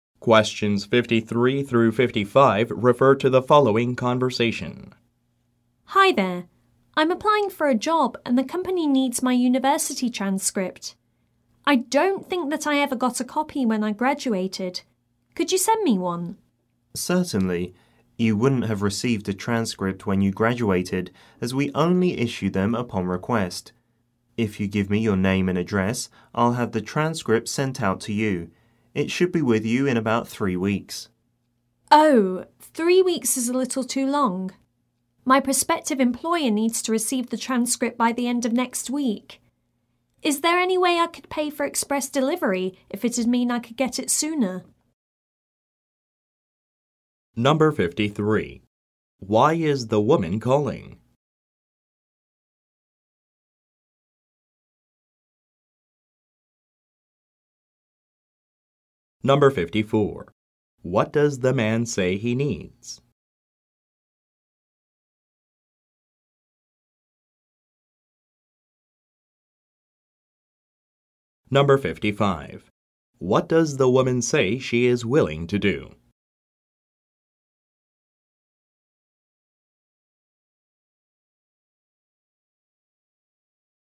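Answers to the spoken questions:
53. To request a copy of her university transcript
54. Her name and address
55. Pay for express delivery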